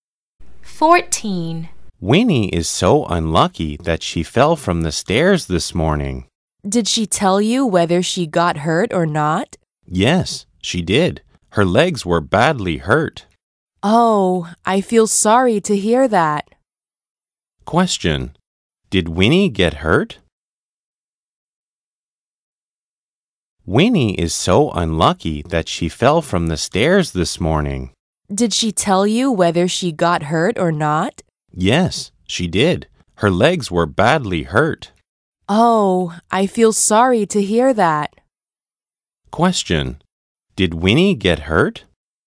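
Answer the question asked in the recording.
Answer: Yes, her legs were badly hurt.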